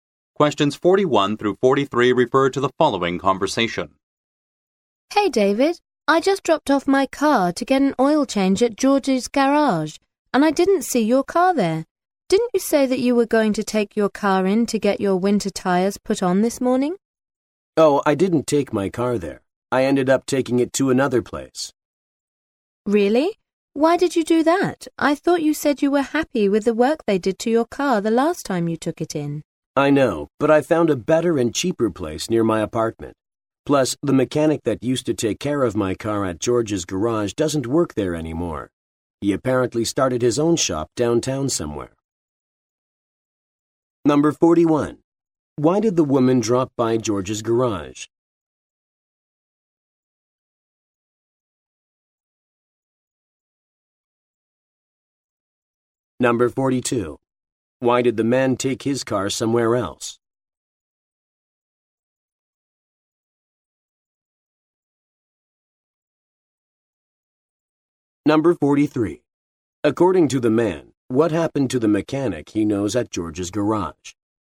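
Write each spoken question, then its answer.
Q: Why did the woman drop by George's garage?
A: To get an oil change

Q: Why did the man take his car somewhere else?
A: He found a better and cheaper place near his apartment

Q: According to the man, what happened to the mechanic he knows at George's garage?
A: He started his own shop downtown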